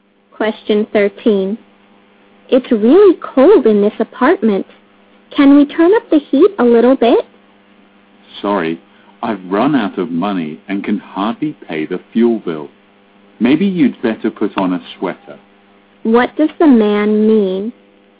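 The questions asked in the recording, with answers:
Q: What does the man mean?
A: He can't afford to turn up the heat, so the woman should put on a sweater.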